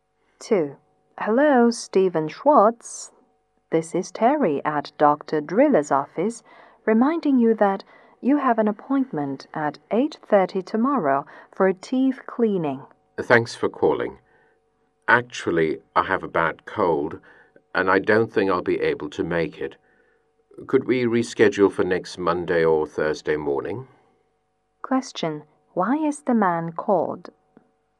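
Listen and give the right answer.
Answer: To remind him of his dental appointment tomorrow at 8:30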